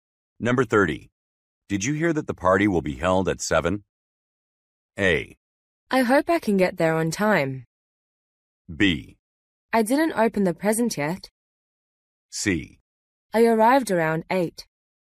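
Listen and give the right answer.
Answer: A: I hope I can get there on time.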